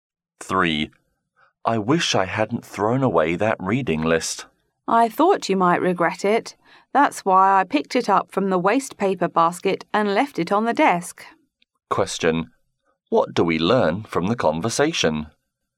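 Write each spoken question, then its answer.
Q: What do we learn from the conversation?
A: The woman picked the reading list out of the wastepaper basket and left it on the desk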